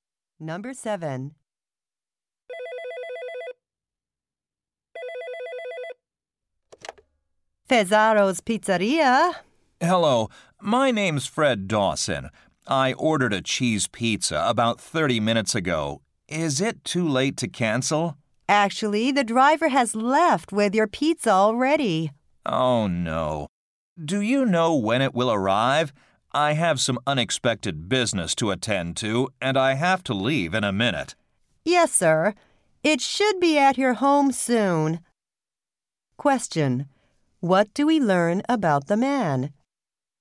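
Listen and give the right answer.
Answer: He wanted to cancel his pizza order because he has to leave.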